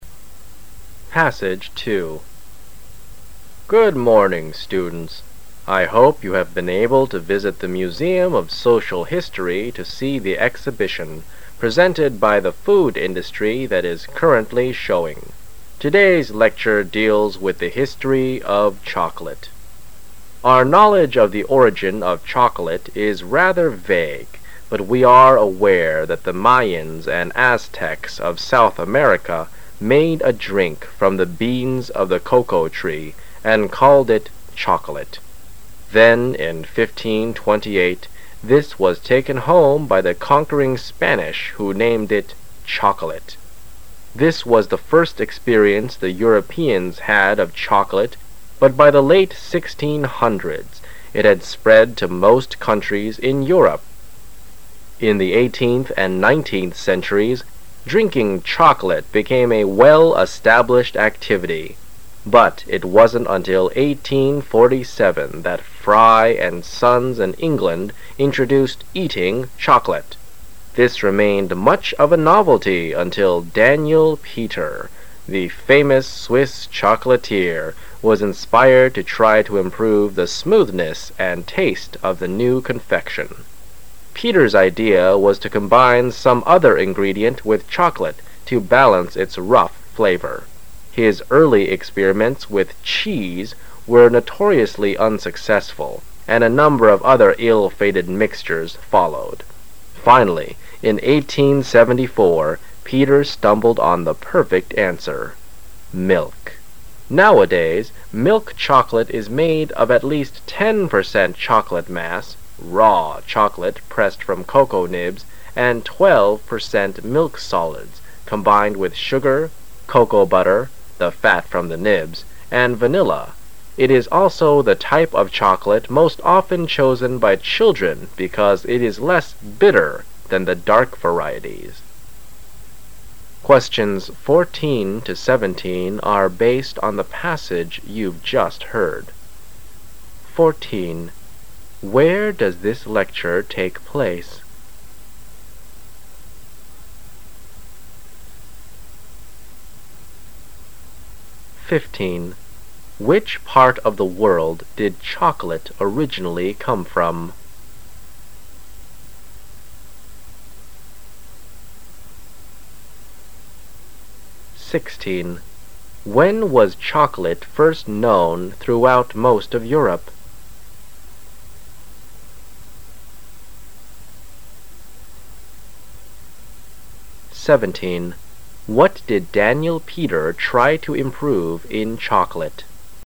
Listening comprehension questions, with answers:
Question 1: Which part of the world did chocolate originally come from?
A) Europe.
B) South America.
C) Spain.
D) England.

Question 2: When was chocolate first known throughout most of Europe?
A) 1528.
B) 1847.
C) The late 1600's.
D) The eighteenth century.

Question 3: What did Daniel Peter try to improve in chocolate?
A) The dark color.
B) The coarse flavor.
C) The smooth taste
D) The rough texture.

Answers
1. B
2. C
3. B

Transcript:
I hope you have been able to visit the museum of social history to see the exhibition, presented by the Food Industry, that is currently showing. Today's lecture deals with the history of chocolate. Our knowledge of the origin of chocolate is rather vague but we are aware that the Mayans and Aztecs of South America made a drink from the beans of the cocoa tree and called it chocolate. Then in 1528 this was taken home by the conquering Spanish who named it chocolate. This was the first experience the Europeans had of chocolate but by the late 1600's it had spread to most countries in Europe. In the eighteenth and nineteenth centuries, drinking chocolate became a well-established activity but it wasn't until 1847 that Fry and Sons in England introduced "eating chocolate". This remained much of a novelty until Daniel Peter. The famous Swiss chocolate, This was inspired to try to improve the smoothness and taste of the new confection. Peter's idea was to combine some other ingredient with chocolate to balance its rough flavor. His early experiments with cheese were notoriously unsuccessful and a number of other ill-fated mixtures followed. Finally, in 1874 Peter stumbled on the perfect answer: milk. Nowadays milk chocolate is made of at least ten percent chocolate mass ("raw" chocolate pressed from cocoa nibs) and twelve percent milk solids combined with sugar, cocoa butter (the fat from the nibs) and vanilla. It is also the type of chocolate most often chosen by children because it is less "bitter" than the dark varieties. Where does this lecture take place?

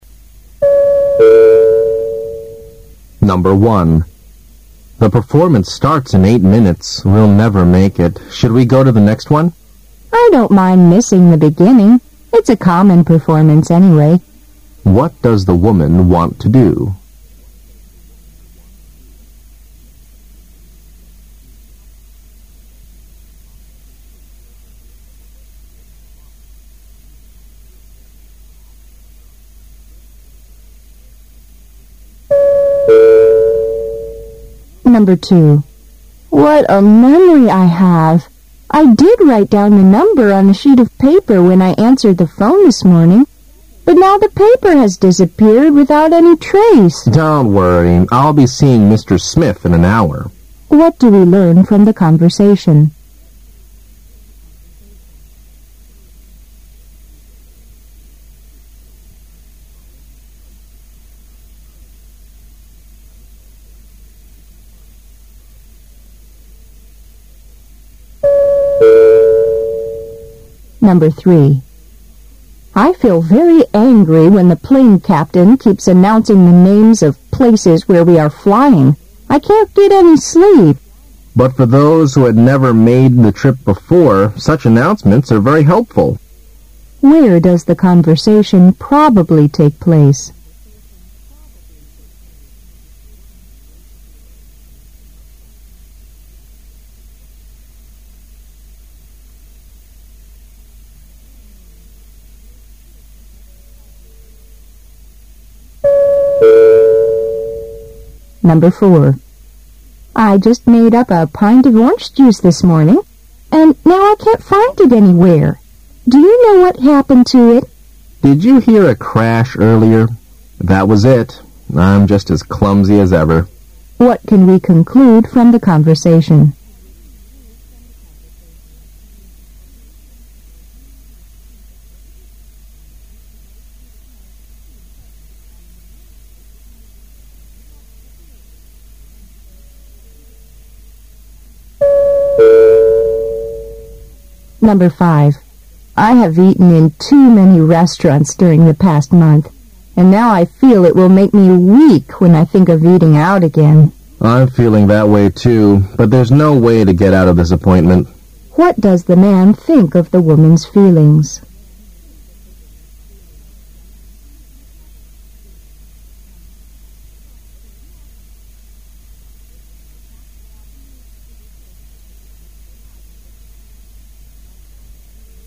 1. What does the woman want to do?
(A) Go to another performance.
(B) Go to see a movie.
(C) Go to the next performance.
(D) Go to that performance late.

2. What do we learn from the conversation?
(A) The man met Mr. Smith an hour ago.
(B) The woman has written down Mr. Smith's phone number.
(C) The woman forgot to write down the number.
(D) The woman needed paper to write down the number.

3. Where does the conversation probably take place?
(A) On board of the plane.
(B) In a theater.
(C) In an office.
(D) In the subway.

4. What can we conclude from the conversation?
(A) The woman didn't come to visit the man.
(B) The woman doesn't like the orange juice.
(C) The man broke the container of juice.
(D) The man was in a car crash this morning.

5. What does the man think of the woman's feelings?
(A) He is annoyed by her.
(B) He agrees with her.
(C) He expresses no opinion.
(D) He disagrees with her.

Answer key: 1D, 2B, 3A, 4C, 5B

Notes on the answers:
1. 推理判断题。男士说演出八分钟后就要开始了,他们不可能及时抵达(make it),问女士是否愿意看下一场。女士说她不介意错过开头,那只是个普通的演出。由此可推知,虽然迟到,但女士还是想进去看这场表演。
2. 信息明示题。本题主要考查对细节的辨认。女士说她早上接电话时,确实把号码记在一张纸上,但是现在那张纸消失得无影无踪了。男士让她不要担心,说他将在一小时后会见史密斯先生。四个选项中只有B)项符合对话内容,故为正确答案。
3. 推理判断题。女士感到非常生气,因为在飞机上,机长不停地广播地名,使她不能入睡。男士说对于那些从未坐过此次班机的人来说,这些广播是非常有帮助的。根据对话中的Plane captain、flying、trip等词的提示以及对话内容可知,对话可能发生在飞机上。
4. 理解归纳题。女士说她到处都找不到上午做好的橘子汁,问男士是否知道是怎么回事,男士说"你那会儿听到破碎声了吗?我和以前一样笨手笨脚。"由此可知,是男士不小心把盛橘子汁的容器打碎了。
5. 观点态度题。题目问男士对女士的感受有何看法。女士说她上个月在餐馆吃的次数太多,不想再出去吃;男士也感觉如此,但他说实在没有办法拒绝这次约会。本题不是but题,关键在

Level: 大学四级

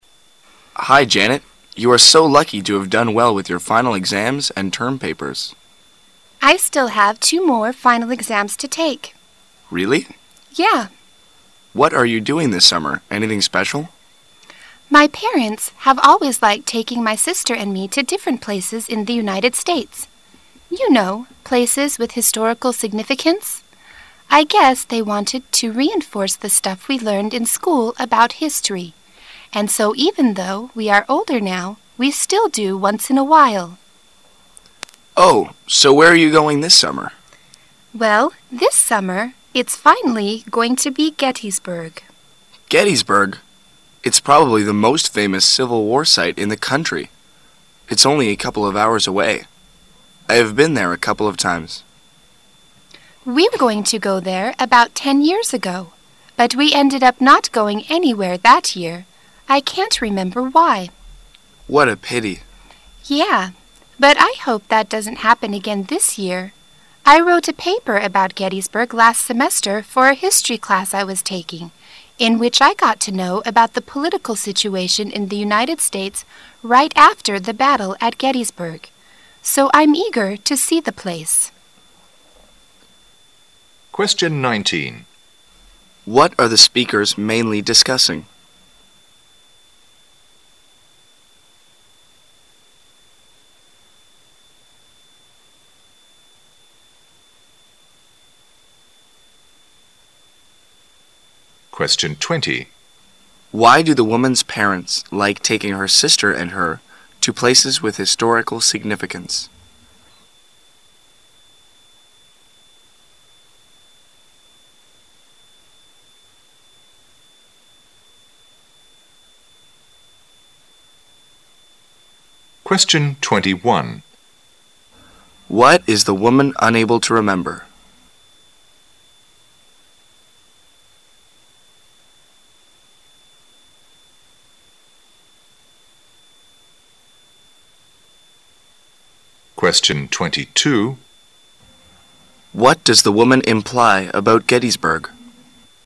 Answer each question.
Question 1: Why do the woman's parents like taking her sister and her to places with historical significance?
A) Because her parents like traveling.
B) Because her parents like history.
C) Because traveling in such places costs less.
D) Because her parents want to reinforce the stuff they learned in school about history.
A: D

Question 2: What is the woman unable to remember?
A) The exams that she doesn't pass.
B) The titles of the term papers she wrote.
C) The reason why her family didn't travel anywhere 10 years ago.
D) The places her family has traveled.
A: C

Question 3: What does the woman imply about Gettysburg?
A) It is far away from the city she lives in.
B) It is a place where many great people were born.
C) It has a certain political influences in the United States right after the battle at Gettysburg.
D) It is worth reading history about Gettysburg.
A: C

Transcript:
[解析] 19-22 M: Hi, Janet, you are so lucky to have done well with your final exams and term papers. W: I still have 2 more final exams to take. M: Really? W: Yeah. M: What are you doing this summer, anything special? W: My parents have always liked taking my sister and me to different places in the United States. You know, places with historical significance. I guess they wanted to reinforce the stuff we learned in school about history. And so even though we are older now, they still do once in a while. M: Oh, so where are you going this summer? W: Well, this summer it's finally going to be Gettysburg. M: Gettysburg ! It's probably the most famous civil war site in the country. It's only a couple of hours away. I have been there a couple of times. W: We were gonna to go there about ten years ago, but we ended up not going anywhere that year. I cannot remember why. M: What a pity! W: Yeah, but I hope that doesn' t happen again this year. I wrote a paper about Gettysburg last semester for a history class I was taking in which I got to know about the political situation in the United States right after the battle at Gettysburg, so I'm eager to see the place. What are the speakers mainly discussing?

